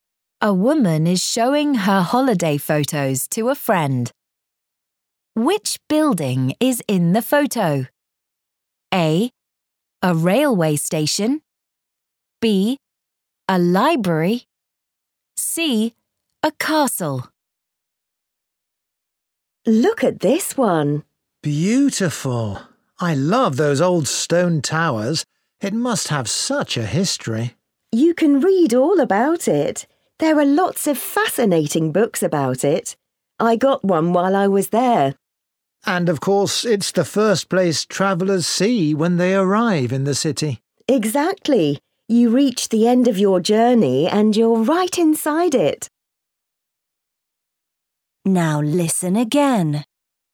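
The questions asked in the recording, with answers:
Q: Which building is in the photo?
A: A: A railway station.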